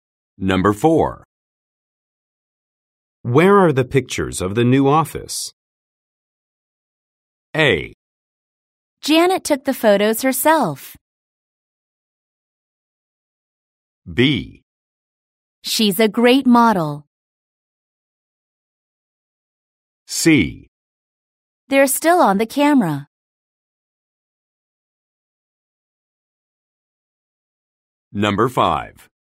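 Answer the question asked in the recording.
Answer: C: They're still on the camera.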